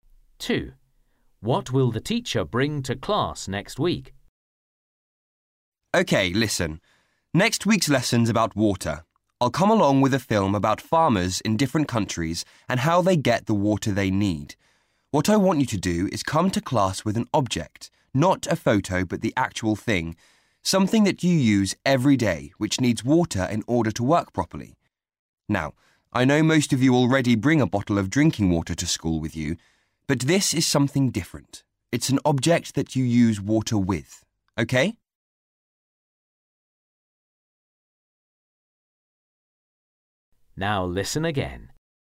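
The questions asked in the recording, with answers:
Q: What will the teacher bring to class next week?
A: a film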